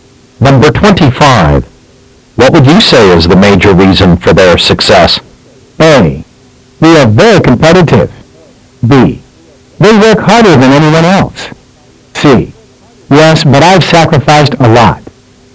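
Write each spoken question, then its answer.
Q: What would you say is the major reason for their success?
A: B: They work harder than anyone else.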